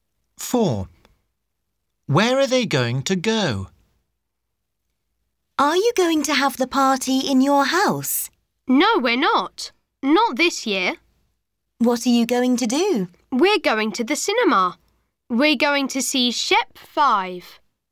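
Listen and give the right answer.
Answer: To the cinema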